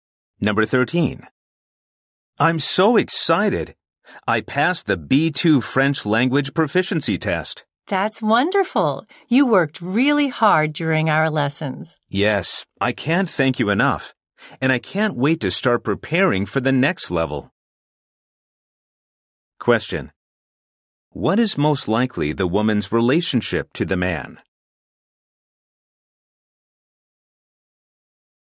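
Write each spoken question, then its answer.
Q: What is most likely the woman's relationship to the man?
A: She is his French teacher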